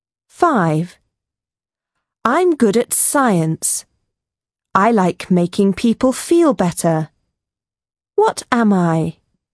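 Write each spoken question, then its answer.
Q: What am I?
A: doctor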